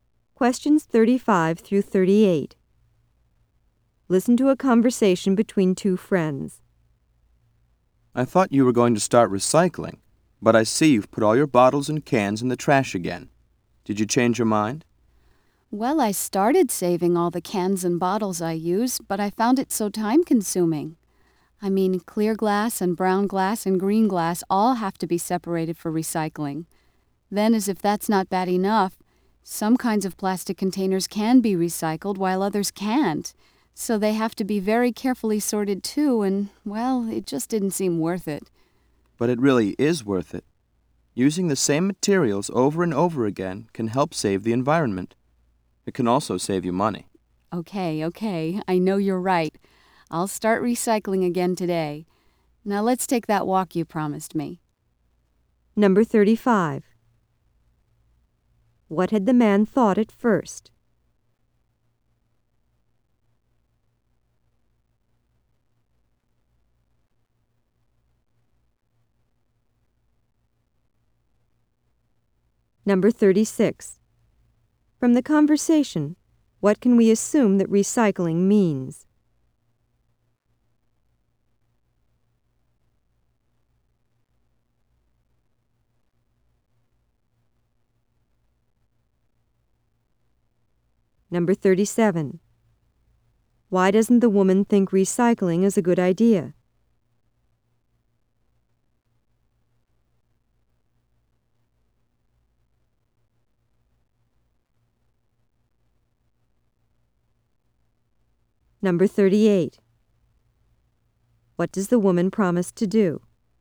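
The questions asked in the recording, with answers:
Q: What had the man thought at first?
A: That the woman was going to start recycling

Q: Why doesn't the woman think recycling is a good idea?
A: It takes too much time to sort everything

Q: What does the woman promise to do?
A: Start recycling again today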